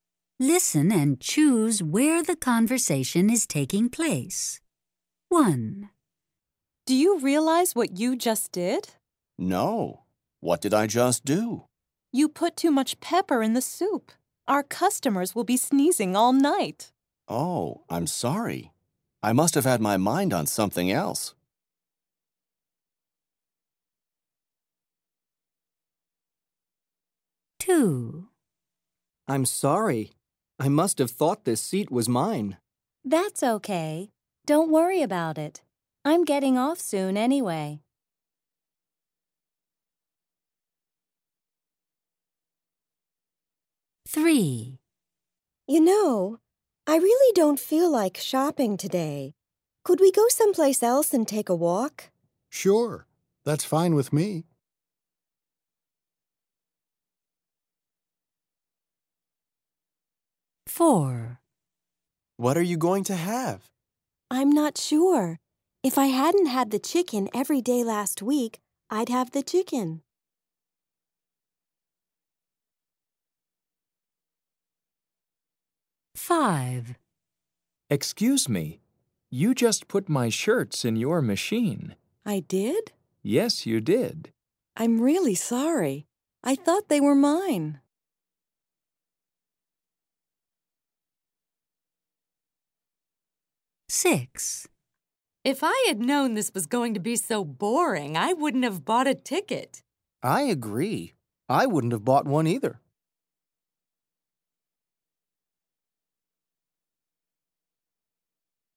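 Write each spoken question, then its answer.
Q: Listen and choose where the conversation is taking place.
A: In a restaurant kitchen

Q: Listen and choose where the conversation is taking place.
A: In a restaurant

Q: Listen and choose where the conversation is taking place.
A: At a laundromat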